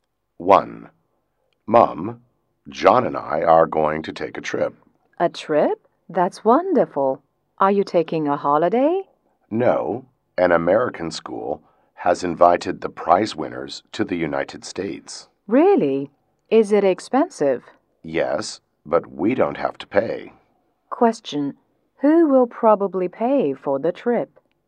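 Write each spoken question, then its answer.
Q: Who will probably pay for the trip?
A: The American school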